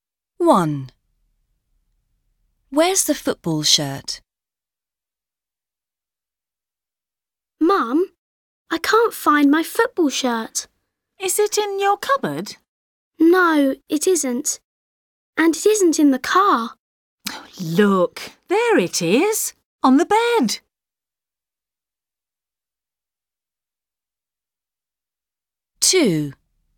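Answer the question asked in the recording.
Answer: On the bed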